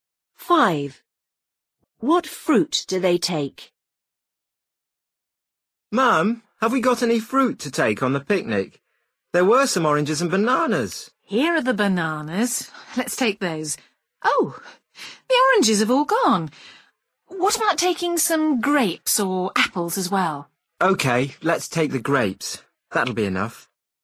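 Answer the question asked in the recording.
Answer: Bananas and grapes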